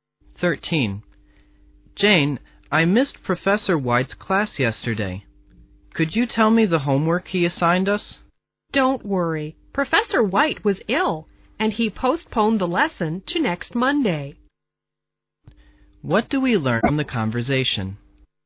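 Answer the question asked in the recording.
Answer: Professor White was ill and postponed the lesson to next Monday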